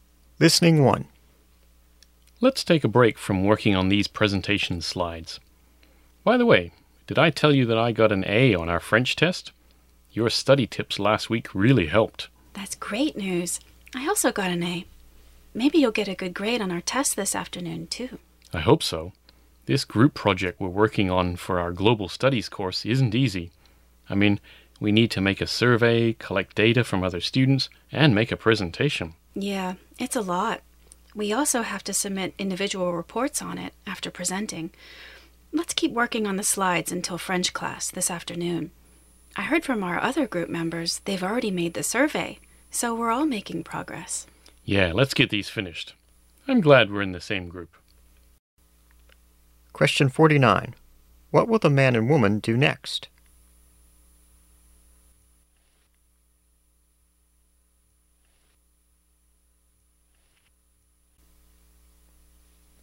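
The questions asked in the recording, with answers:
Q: What will the man and woman do next?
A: Keep working on the presentation slides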